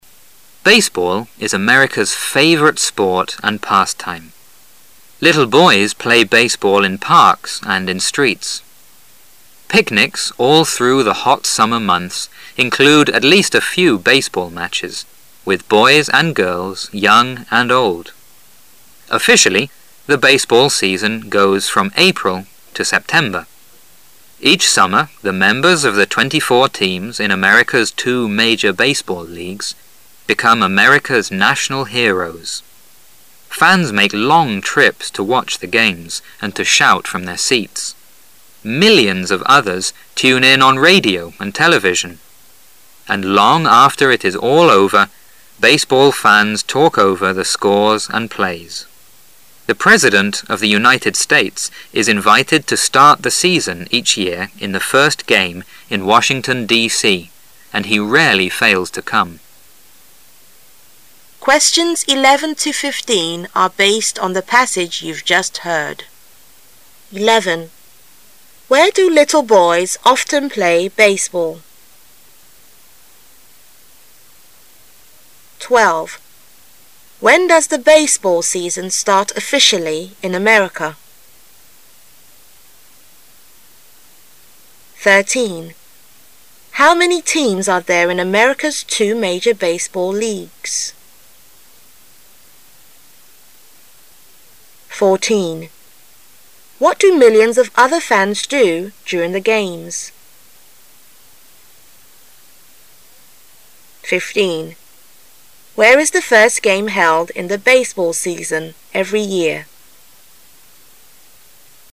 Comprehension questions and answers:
When you hear a question, you should complete the answer with a word or a short phrase (in no more that 3 words).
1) Where do often little boys play baseball? They play baseball in parks and ______.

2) When does the baseball season start officially in America? It begins from ______.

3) How many teams are there in America's two major baseball leagues?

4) What do millions of other fans do during the games? They tune in on ______.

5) Where is the first game held in the baseball season, every year?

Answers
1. (in)streets
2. April
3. 24
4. radio and television
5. Washington.D.C

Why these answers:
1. 本题问小男孩们经常在哪打棒球。答案在文章的开头Little boys play baseball in parks and in streets。
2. 本题问正式的棒球赛季什么时候开始。要利用题目中的信息,注意其在录音中的位置,本题中officially和baseball season是关键词语。.原文是说Officially,the baseball season goes from April to September.,可见棒球赛季是在April四月份开始。
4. 本题问数百万其他球迷在比赛期间干什么。本题的关键词是millions of other fans,应注意其在录音中的位置。
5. 本题问每年棒球赛季的第一场比赛在哪举行。最后一题的答案往往出现在文章的结尾。本题答案就在最后一句。听音时要抓住关键词the first game,听到该短语出现的位置,也就找到了答案。

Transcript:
Little boys play baseball in parks and in streets. Picnics all through the hot summer months include at least a few baseball matches with boys and girls, young and old. Officially, the baseball season goes from April to September: Each summer the members of the 24 teams in America's two major baseball leagues be come America's national heroes. Falls make long trips to watch the games and to shout from their scats. Millions of others tune in on radio and television, And long after it is all over, baseball tans talk over the scores and plays. The president of the United States is invited to start the season each year in the first game in Washington, D.C, and he ralely fails to come. 11.